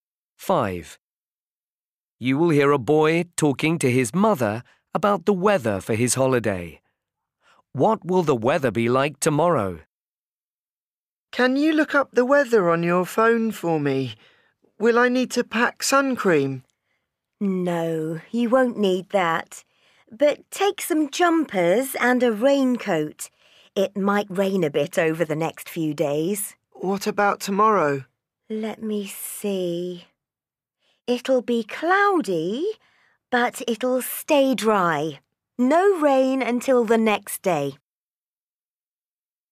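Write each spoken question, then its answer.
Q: What will the weather be like tomorrow?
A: cloudy but dry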